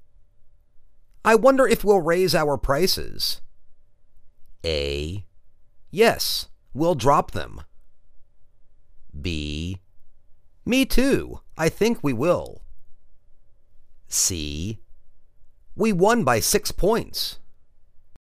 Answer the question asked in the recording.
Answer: Me too. I think we will.